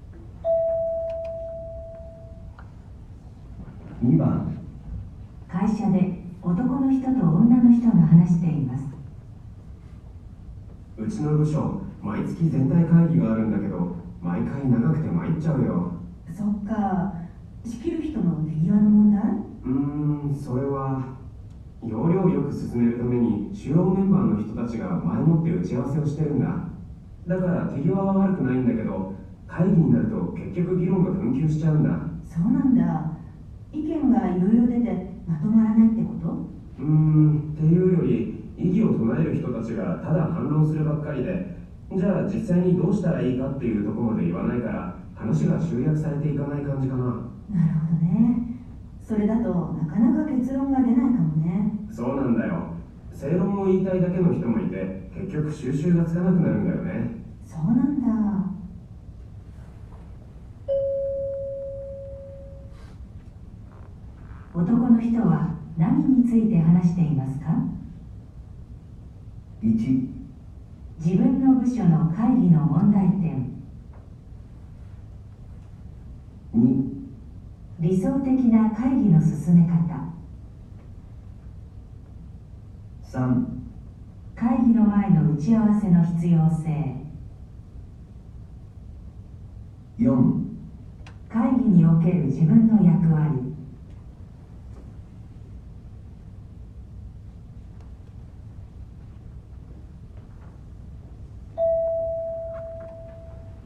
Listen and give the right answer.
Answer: 1

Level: N1 Listening · Test 2